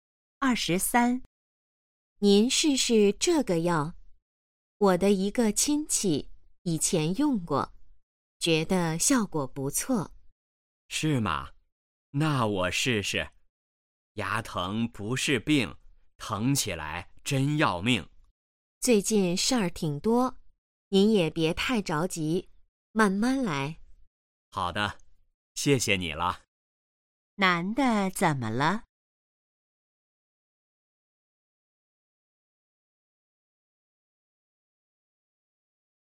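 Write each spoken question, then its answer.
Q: 男的怎么了?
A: 牙疼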